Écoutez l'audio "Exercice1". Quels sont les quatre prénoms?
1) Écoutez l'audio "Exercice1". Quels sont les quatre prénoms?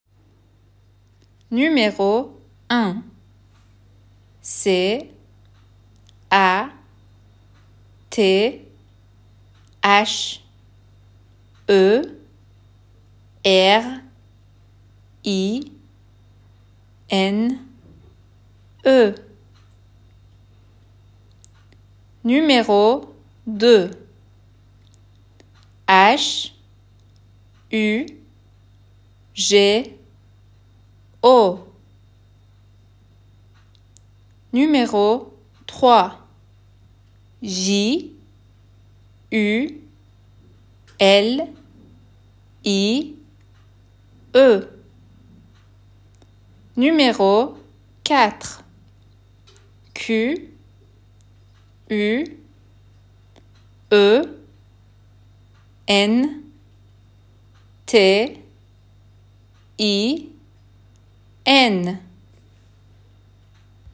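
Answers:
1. Catherine, Hugo, Julie, Quentin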